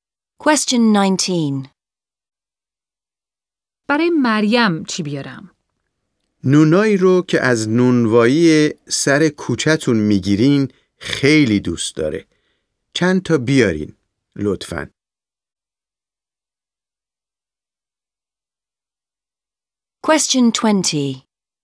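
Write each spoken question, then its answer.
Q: برای مریم چی بیارم؟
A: نان از نانوایی سر کوچه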